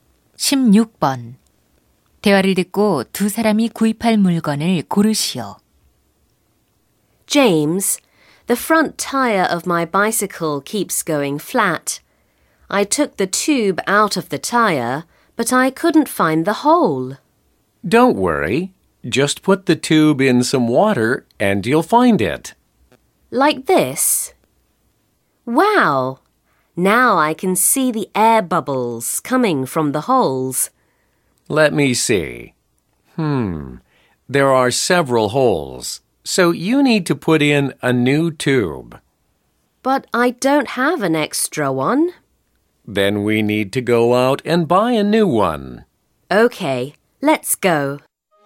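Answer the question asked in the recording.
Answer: 자전거 타이어 튜브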